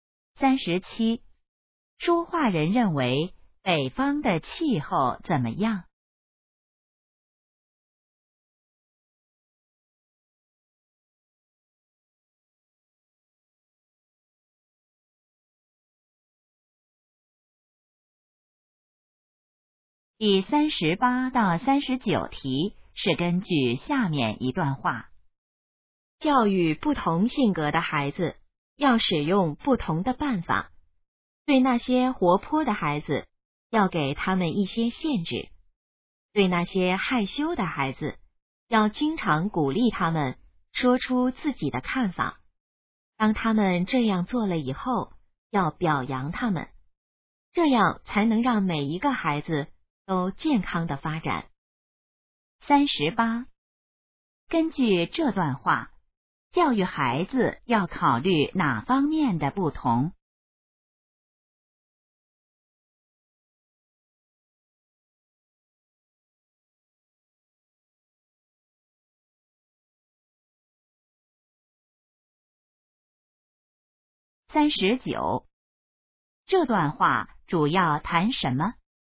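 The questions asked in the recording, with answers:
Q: 根据这段话,教育孩子要考虑哪方面的不同?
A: 性格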